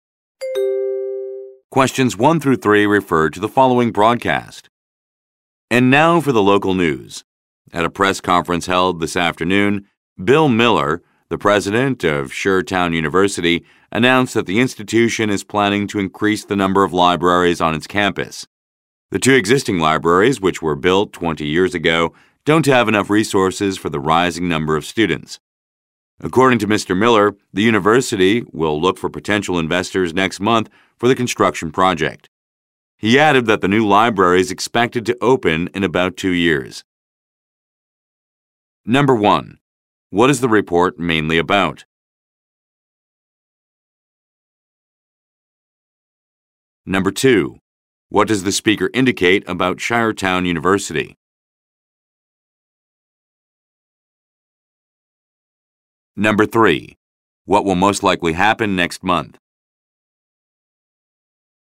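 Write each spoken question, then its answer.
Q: What is the report mainly about?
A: A university's plan to build more libraries on its campus

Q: What will most likely happen next month?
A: The university will look for investors for the construction project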